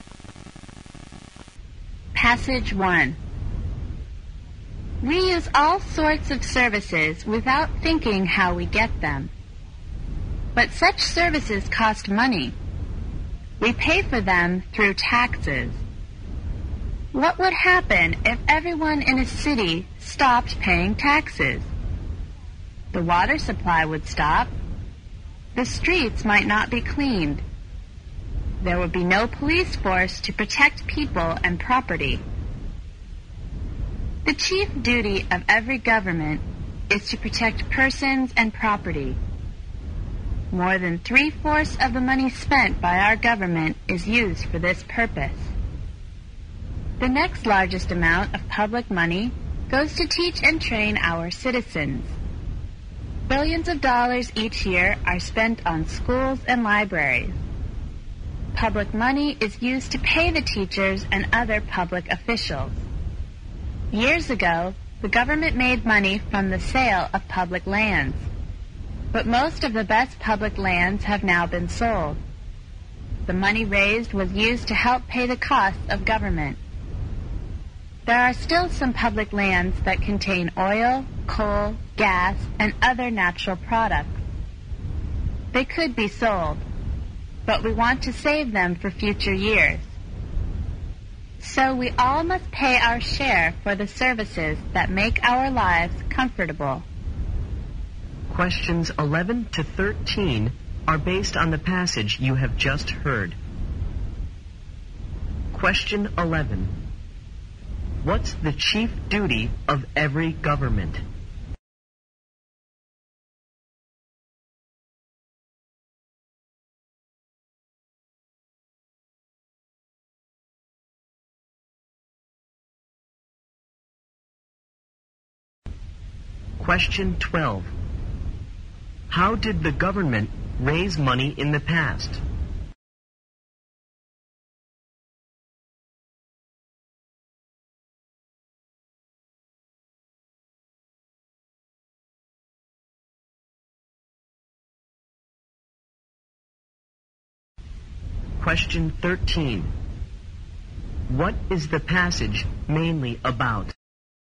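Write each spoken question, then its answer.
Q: What's the chief duty of every government?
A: To protect persons and property

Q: How did the government raise money in the past?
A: By selling public lands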